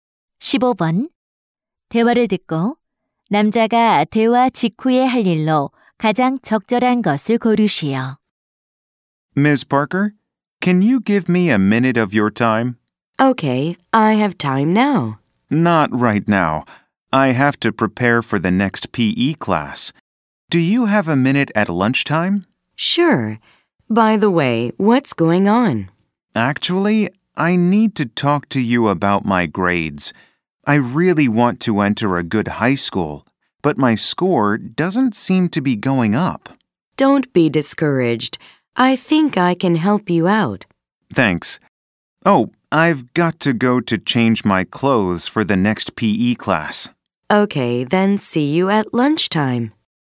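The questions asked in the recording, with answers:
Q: 대화를 듣고 남자가 대화 직후에 할 일로 가장 적절한 것을 고르시오.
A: 체육 수업을 위해 옷 갈아입기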